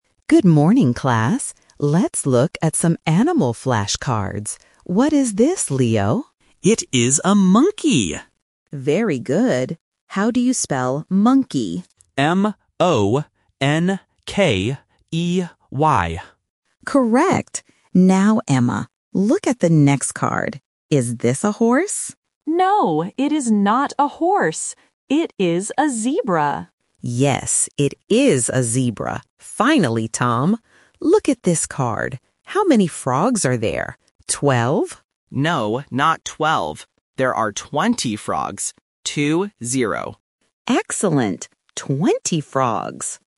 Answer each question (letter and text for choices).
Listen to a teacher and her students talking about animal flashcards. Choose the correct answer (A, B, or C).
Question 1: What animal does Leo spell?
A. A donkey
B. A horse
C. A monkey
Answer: C. A monkey

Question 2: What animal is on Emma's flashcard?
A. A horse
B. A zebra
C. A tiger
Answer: B. A zebra

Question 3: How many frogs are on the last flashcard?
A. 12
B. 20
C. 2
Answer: B. 20

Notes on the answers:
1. Leo says, "It is a monkey!" and then spells it "M-O-N-K-E-Y." Option B (A horse) is a trap because the teacher mentions it later to another student. Option A (A donkey) rhymes with monkey but is not mentioned.
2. The teacher asks if it is a horse, but Emma answers, "No, it is not a horse. It is a zebra." Option A (A horse) is the trap because the teacher asks about it. Option C (A tiger) is plausible for a flashcard but is not in the audio.
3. Tom says, "There are twenty frogs. Two, zero." Option A (12) is the trap because the teacher guesses "Twelve?" first. Option C (2) is a distractor from the "two" in "two, zero".

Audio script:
Teacher: Good morning, class. Let's look at some animal flashcards. What is this, Leo?
Leo: It is a monkey!
Teacher: Very good. How do you spell monkey?
Leo: M-O-N-K-E-Y.
Teacher: Correct! Now, Emma. Look at the next card. Is this a horse?
Emma: No, it is not a horse. It is a zebra.
Teacher: Yes, it is a zebra. Finally, Tom. Look at this card. How many frogs are there?

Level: A1